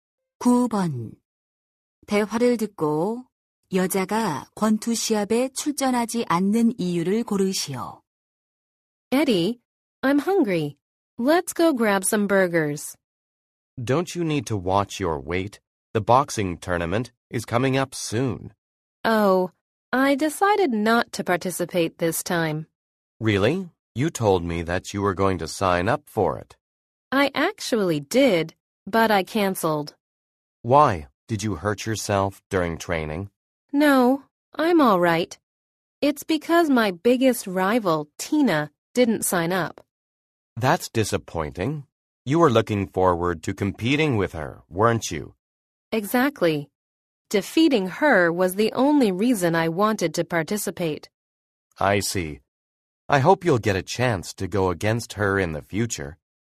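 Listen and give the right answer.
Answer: 가장 큰 라이벌인 Tina가 신청하지 않아서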